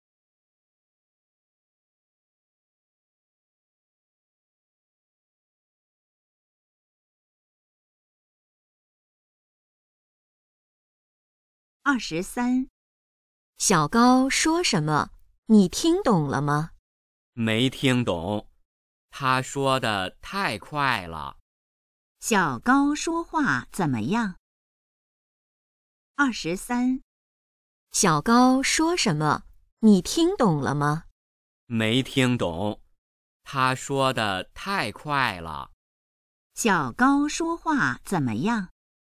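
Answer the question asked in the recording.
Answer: 说得太快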